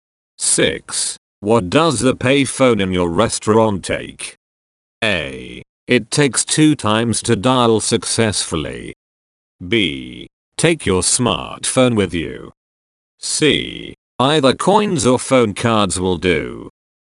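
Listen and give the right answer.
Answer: C: Either coins or phone cards will do.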